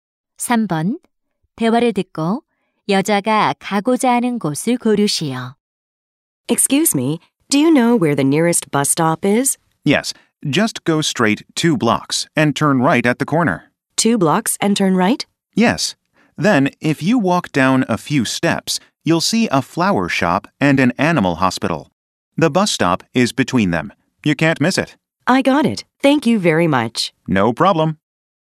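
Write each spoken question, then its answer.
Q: 대화를 듣고 여자가 가고자 하는 곳을 고르시오.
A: 버스 정류장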